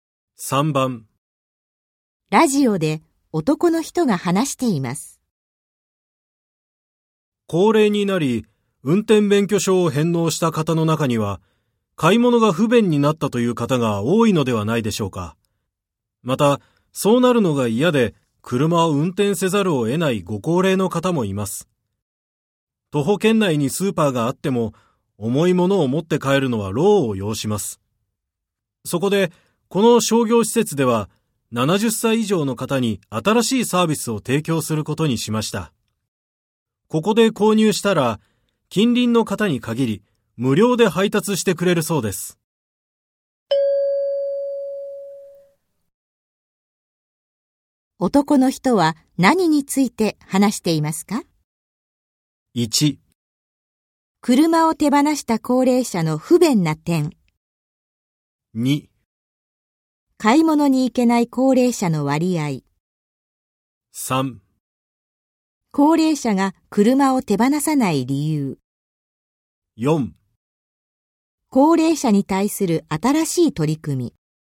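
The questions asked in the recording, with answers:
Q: 男の人は何について話していますか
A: 4: 高齢者に対する新しい取り組み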